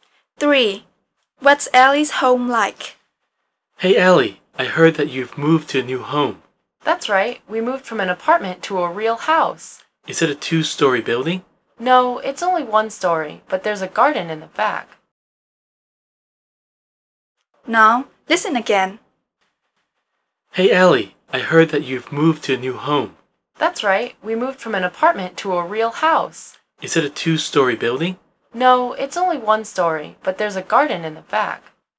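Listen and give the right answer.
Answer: A one-story house with a garden in the back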